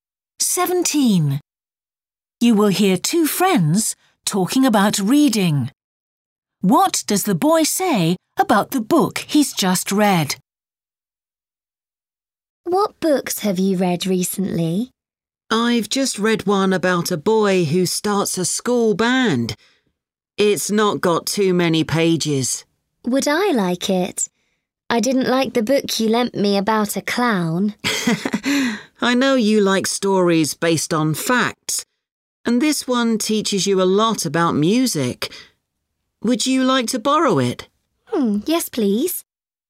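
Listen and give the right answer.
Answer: It's based on facts and teaches a lot about music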